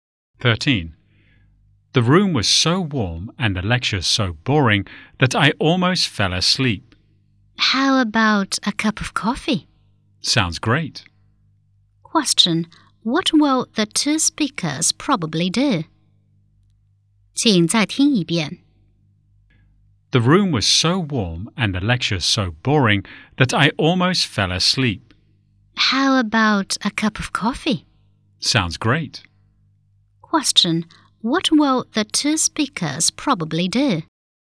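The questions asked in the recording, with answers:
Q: what will the 2 speakers probably do?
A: Have a cup of coffee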